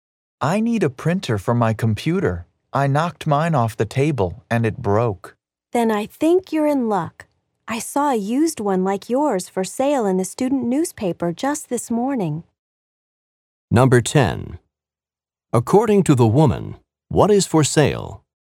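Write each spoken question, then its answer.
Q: According to the woman, what is for sale?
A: A used printer like the man's.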